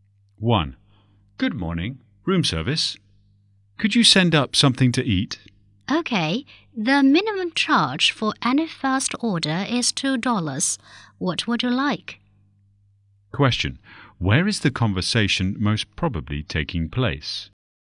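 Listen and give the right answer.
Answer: In a hotel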